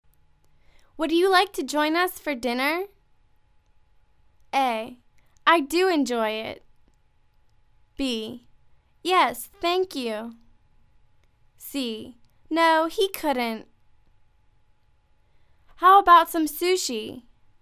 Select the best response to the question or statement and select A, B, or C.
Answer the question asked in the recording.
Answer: Yes, thank you.